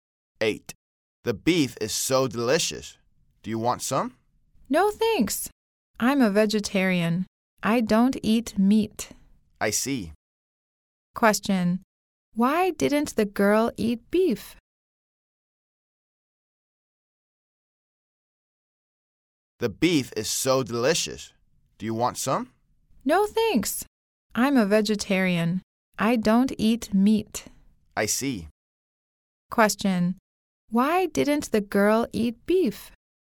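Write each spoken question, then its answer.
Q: Why didn't the girl eat beef?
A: She is a vegetarian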